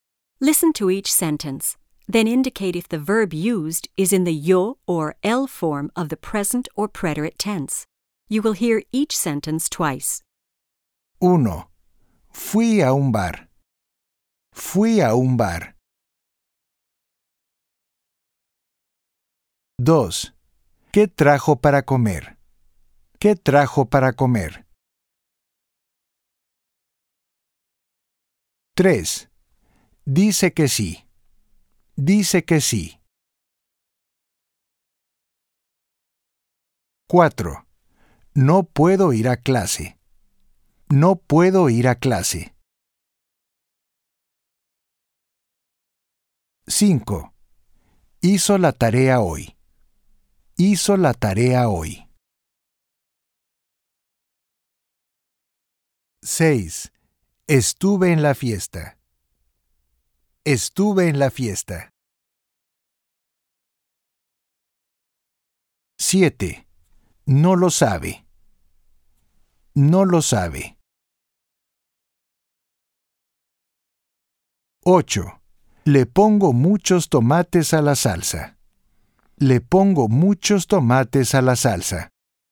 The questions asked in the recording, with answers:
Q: Fui a un bar.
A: Yo, pretérito.

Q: ¿Qué trajo para comer?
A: Él, pretérito.

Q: Dice que sí.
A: Él, presente.

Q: No puedo ir a clase.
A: Yo, presente.

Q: Hizo la tarea hoy.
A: Él, pretérito.

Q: Estuve en la fiesta.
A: Yo, pretérito.

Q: No lo sabe.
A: Él, presente.

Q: Le pongo muchos tomates a la salsa.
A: Yo, presente.